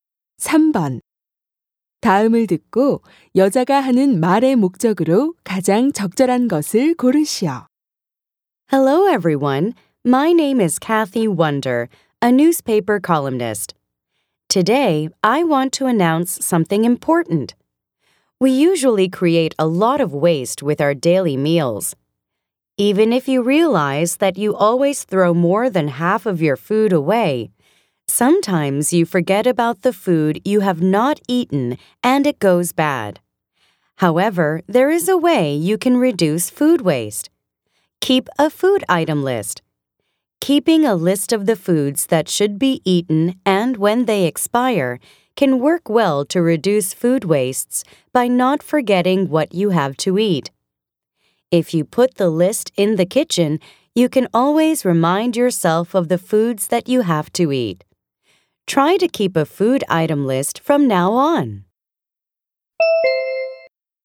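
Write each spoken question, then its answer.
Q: 다음을 듣고 여자가 하는 말의 목적으로 가장 적절한 것을 고르시오.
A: 음식물 쓰레기를 줄이기 위해 식품 목록 작성을 권장하려고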